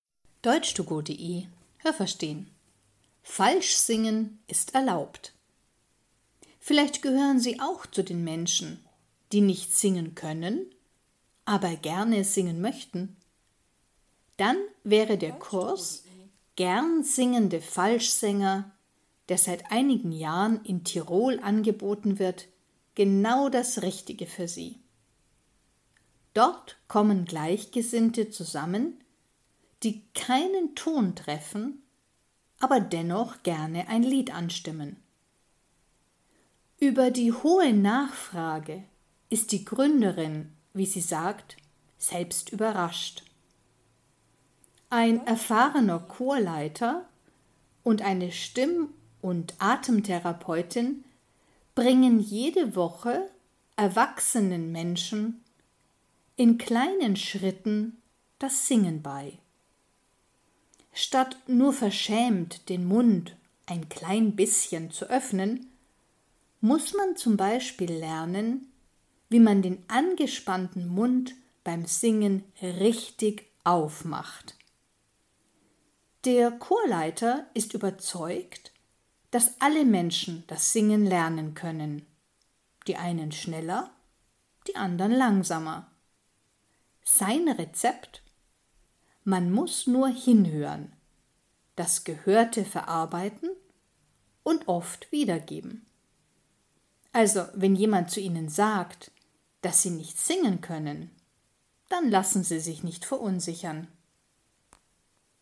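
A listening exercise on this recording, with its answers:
Haben Sie das gehört? Stimmt diese Aussage?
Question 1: Viele Menschen interessieren sich für diesen Kurs.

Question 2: Ein Chorleiter und eine Atemtherapeutin unterrichten kleine Kinder.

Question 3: In diesem Kurs lernt man das Singen, während man spazieren geht.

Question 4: Es genügt beim Singen oft, wenn man den Mund nur ein klein bisschen öffnet.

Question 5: Der Chorleiter ist sicher, dass jede Person das Singen lernen kann.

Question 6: Wenn man genau hinhört und das Gehörte oft übt, dann lernt man das Singen.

Welches Verb passt?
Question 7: Menschen, die nicht singen können, _____ keinen Ton.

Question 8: Manche Menschen singen nicht gut, möchten aber trotzdem ein Lied _____ .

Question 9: Der Kurs „Gernsingende Falschsänger" wird seit einigen Jahren _____ .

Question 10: Ein Chorleiter hat Menschen das Singen _____ .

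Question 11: Wenn jemand sagt, dass Sie nicht singen können, dann lassen Sie sich nicht _____ .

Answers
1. richtig
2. falsch
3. falsch
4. falsch
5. richtig
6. richtig
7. treffen
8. anstimmen
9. angeboten
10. beigebracht
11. verunsichern

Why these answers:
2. Sie bringen Erwachsenen das Singen bei.
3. Man lernt das Singen in kleinen Schritten, das heißt langsam.
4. Man muss den Mund richtig aufmachen.

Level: B (mittel)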